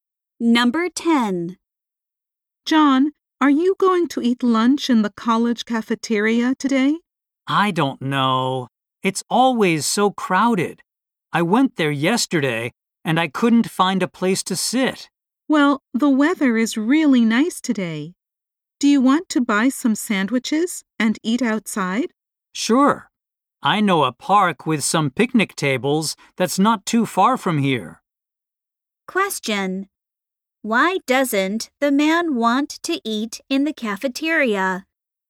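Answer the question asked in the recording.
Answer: It is always too crowded.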